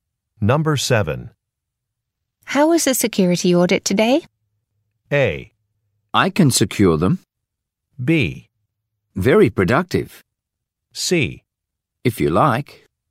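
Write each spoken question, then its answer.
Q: How is the security audit today?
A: B: Very productive.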